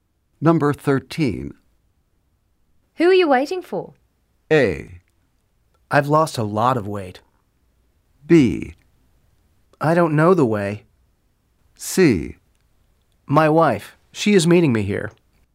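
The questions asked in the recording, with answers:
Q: Who are you waiting for?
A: C: My wife. She is meeting me here.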